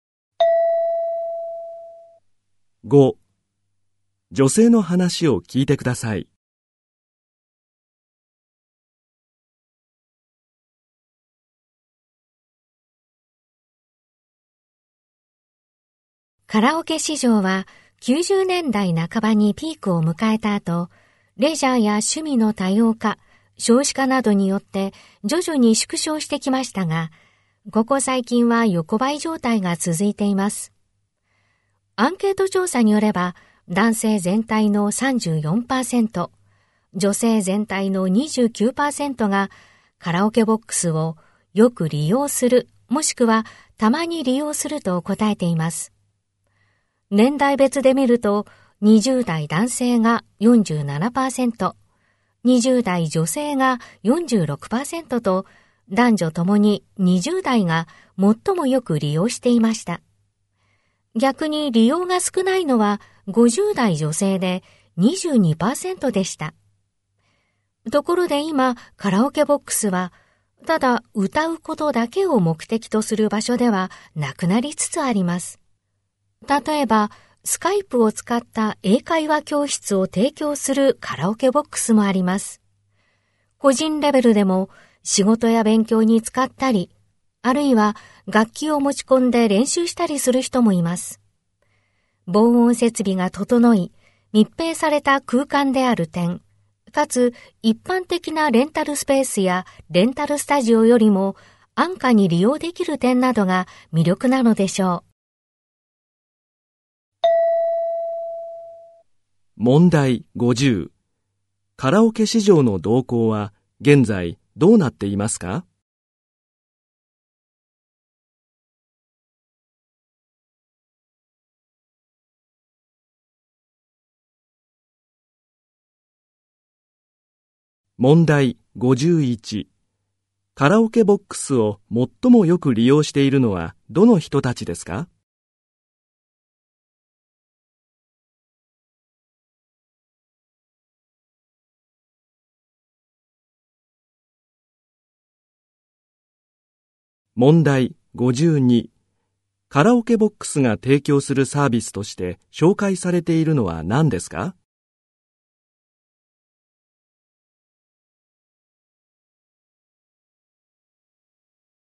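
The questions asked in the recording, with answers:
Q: カラオケ市場の動向は現在どうなっていますか?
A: 横ばい状態が続いている

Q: カラオケボックスを最もよく利用しているのはどの人たちですか?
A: 20代の男女

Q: カラオケボックスが提供するサービスとして紹介されているのは何ですか?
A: スカイプを使った英会話教室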